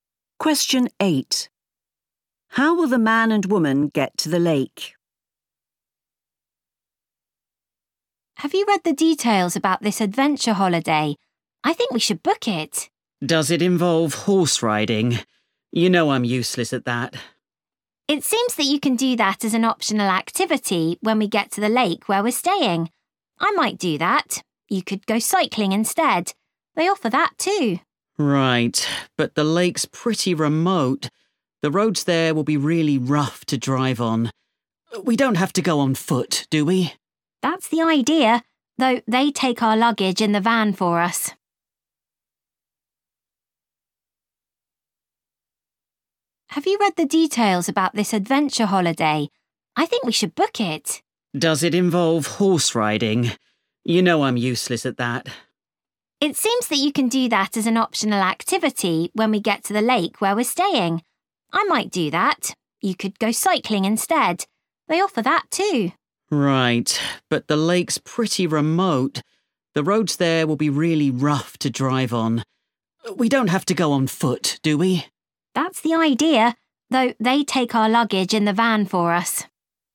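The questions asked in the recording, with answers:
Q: How will the man and woman get to the lake?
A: On foot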